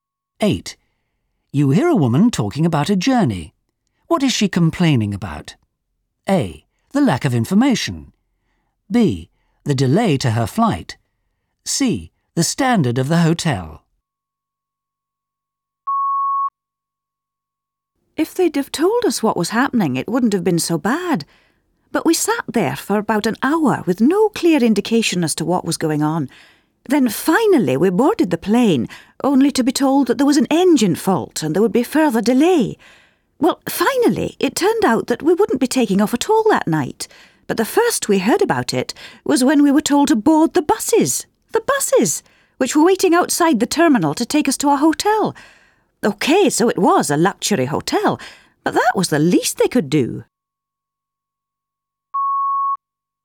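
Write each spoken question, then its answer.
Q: What is she complaining about?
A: A: The lack of information.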